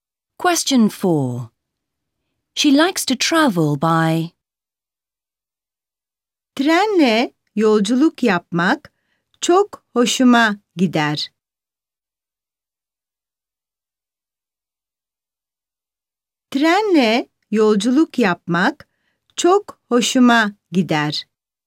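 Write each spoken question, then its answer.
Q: She likes to travel by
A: train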